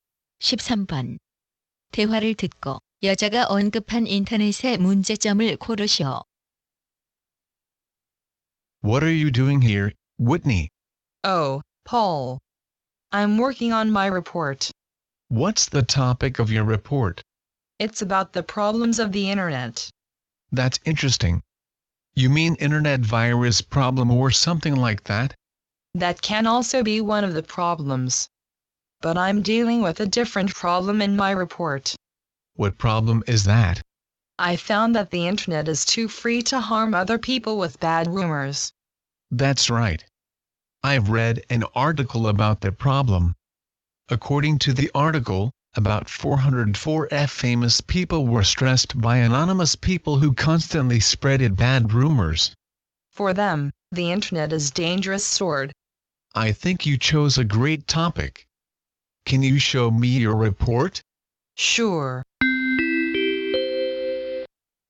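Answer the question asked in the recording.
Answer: 악성 소문으로 다른 사람에게 피해를 줌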